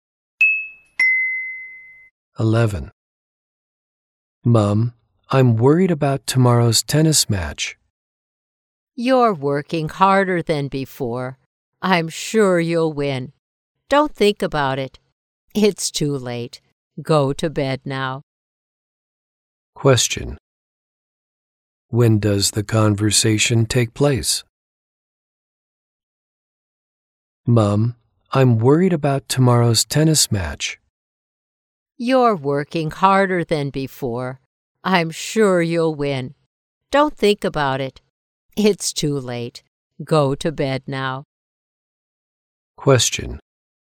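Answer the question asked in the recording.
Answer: At night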